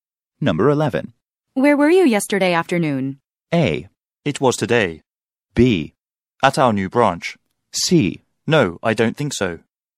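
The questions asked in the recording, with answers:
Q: Where were you yesterday afternoon?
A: B: At our new branch.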